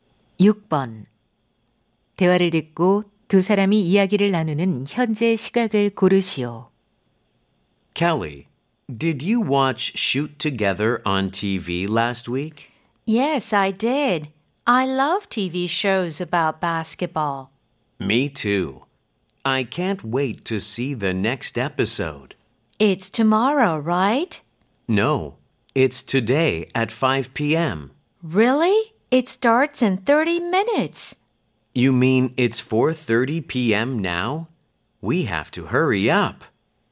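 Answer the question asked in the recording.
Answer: 오후 4시 30분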